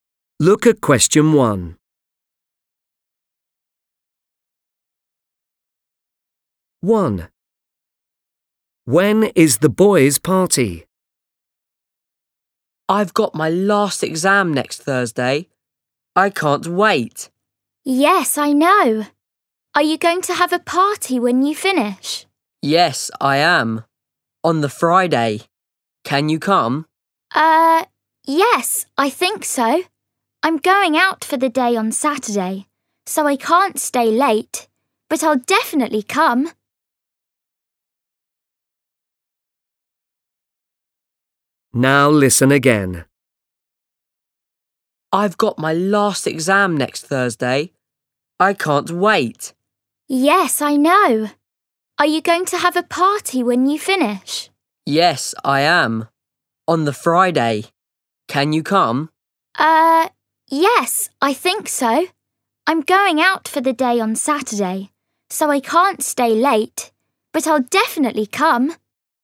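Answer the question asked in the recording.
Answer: On Friday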